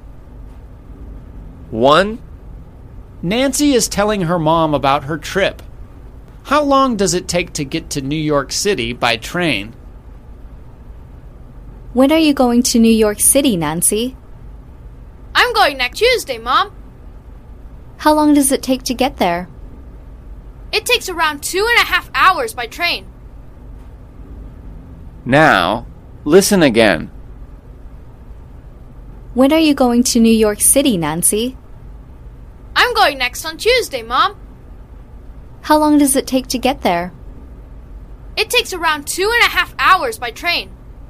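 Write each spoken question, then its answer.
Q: How long does it take to get to New York City by train?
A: Around 2.5 hours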